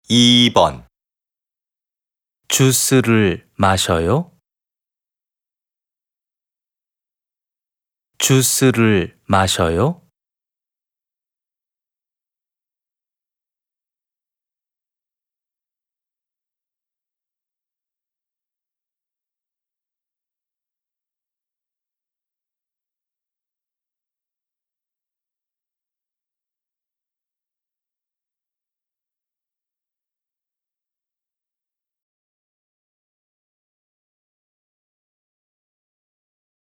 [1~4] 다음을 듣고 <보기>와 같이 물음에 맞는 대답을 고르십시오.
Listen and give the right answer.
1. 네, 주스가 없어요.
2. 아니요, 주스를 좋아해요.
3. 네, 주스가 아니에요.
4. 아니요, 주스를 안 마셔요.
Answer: 4. 아니요, 주스를 안 마셔요.

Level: TOPIK I